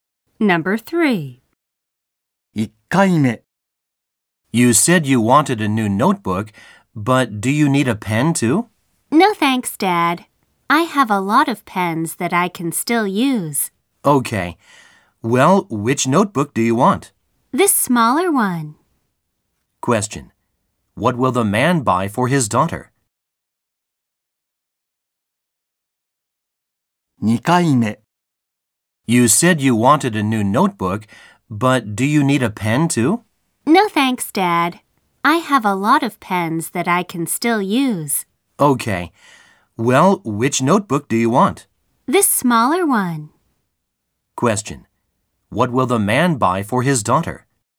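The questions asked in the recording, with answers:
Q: What will the man buy for his daughter?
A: The smaller notebook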